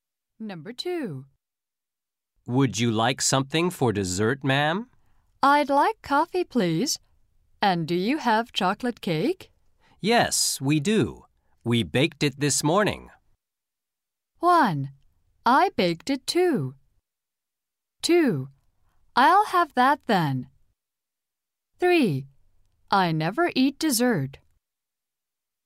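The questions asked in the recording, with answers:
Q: Yes, we do. We baked it this morning.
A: 2: I'll have that then.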